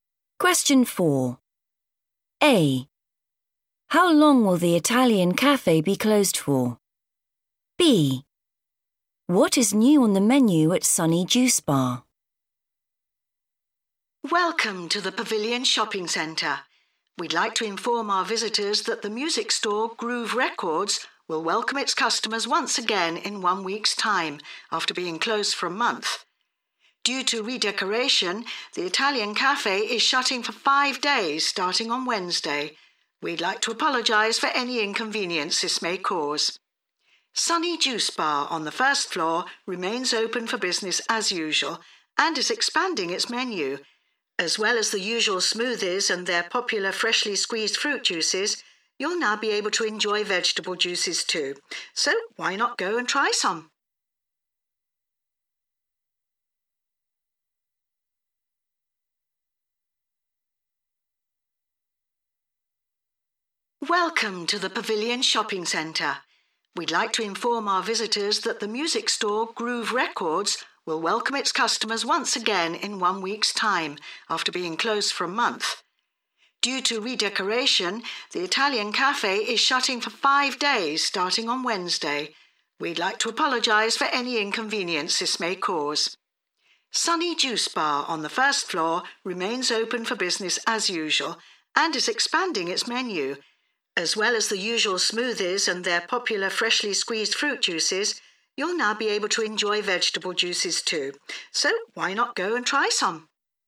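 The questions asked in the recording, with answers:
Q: How long will the Italian cafe be closed for?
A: 5 days

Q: What is new on the menu at Sunny Juice Bar?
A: vegetable juices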